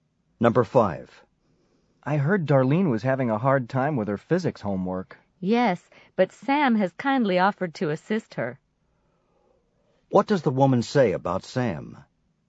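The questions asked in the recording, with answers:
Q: What does the woman say about Sam?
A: He has offered to help Darlene with her physics homework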